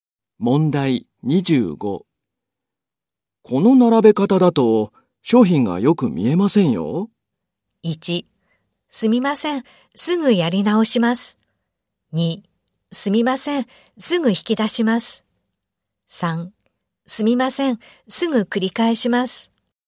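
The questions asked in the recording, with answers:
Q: この並べ方だと、商品がよく見えませんよ。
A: 1: すみません、すぐやり直します。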